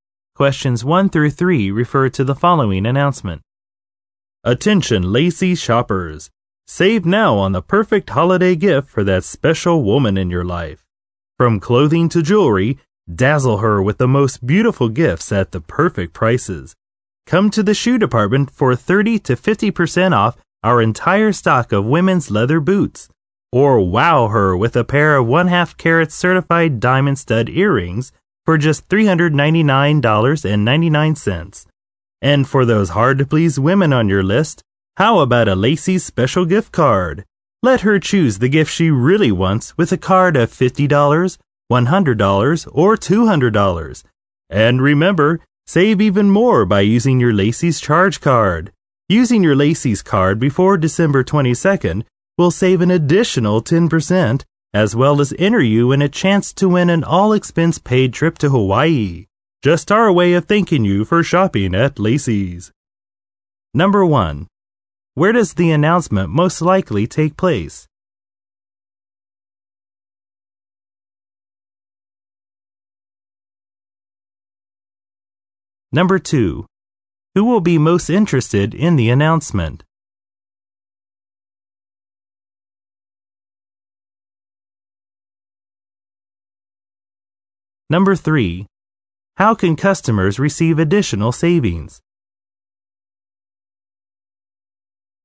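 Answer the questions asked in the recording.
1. In a department store (Lacey's)
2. Shoppers buying holiday gifts for women
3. By using their Lacey's charge card before December 22nd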